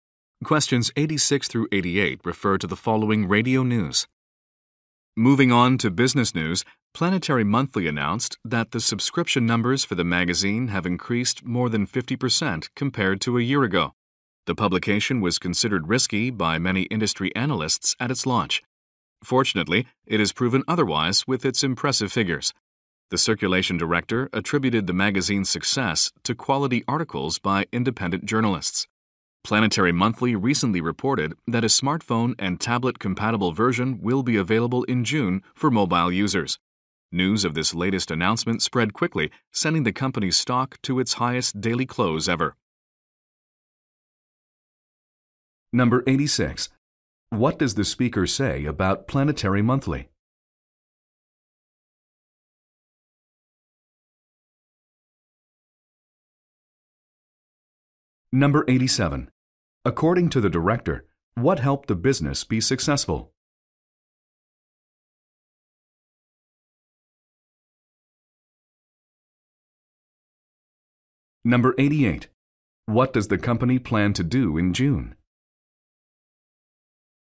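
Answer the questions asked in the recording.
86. Its subscriptions increased more than 50%
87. Quality articles by independent journalists
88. Release a mobile version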